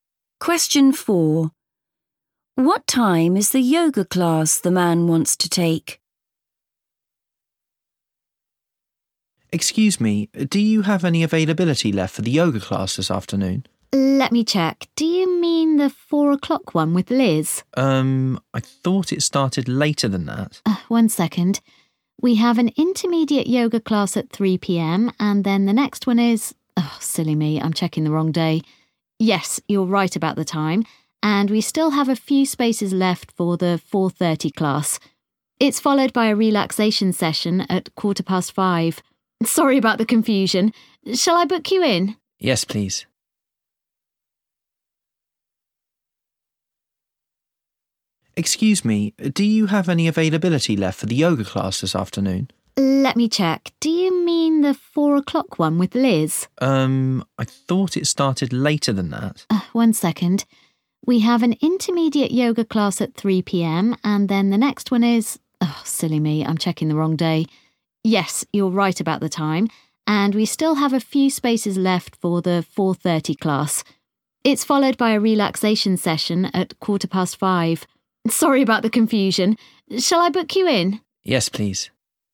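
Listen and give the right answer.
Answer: 4:30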